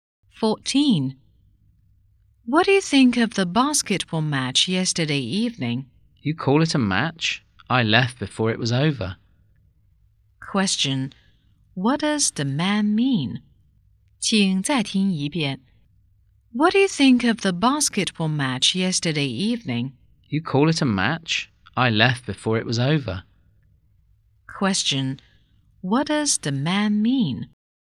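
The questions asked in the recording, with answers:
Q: Question. What does the man mean?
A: The match was very poor, so he left early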